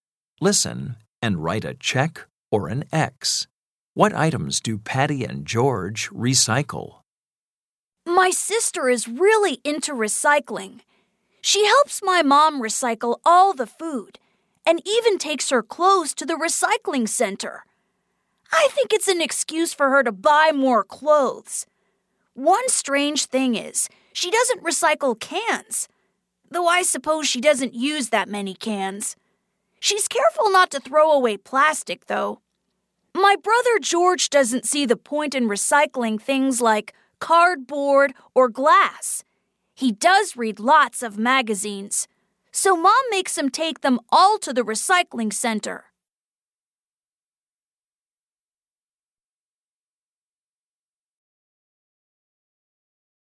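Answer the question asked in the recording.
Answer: Patty recycles food, clothes and plastic but not cans; George recycles magazines but not cardboard or glass.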